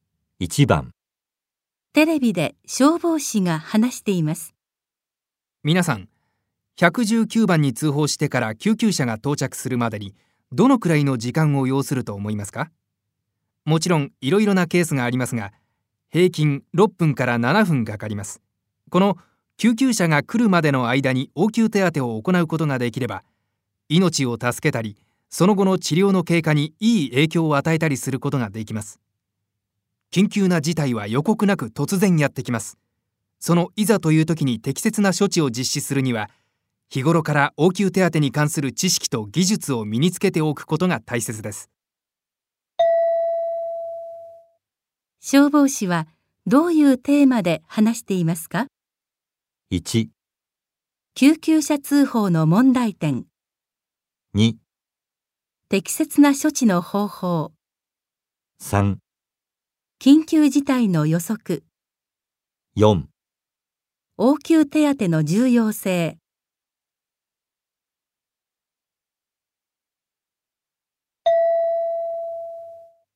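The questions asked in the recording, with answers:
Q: 消防士はどういうテーマで話していますか?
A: 4: 応急手当の重要性。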